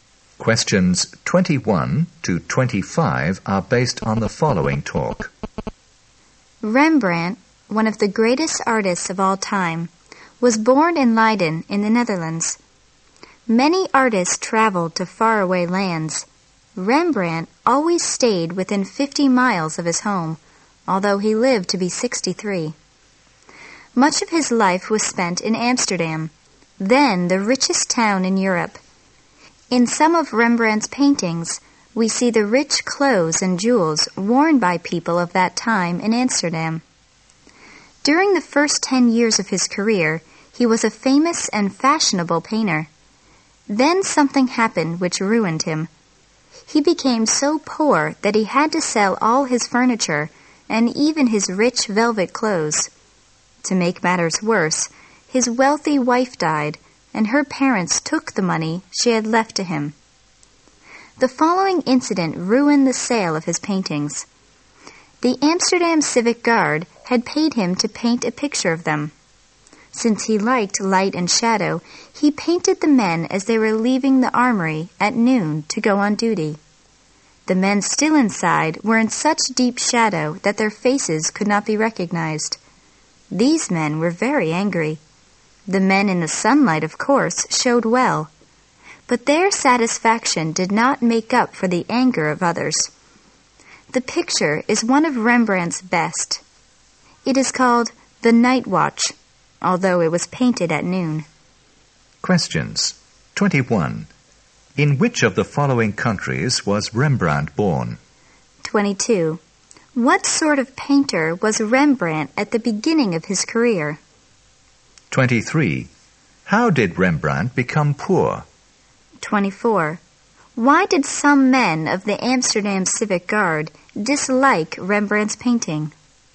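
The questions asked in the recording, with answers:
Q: In which of the following countries was Rembrandt born?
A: The Netherlands

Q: What sort of painter was Rembrandt at the beginning of his career?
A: A famous and fashionable painter

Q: Why did some men of the Amsterdam Civic Guard dislike Rembrandt's painting?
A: Their faces were in deep shadow and could not be recognized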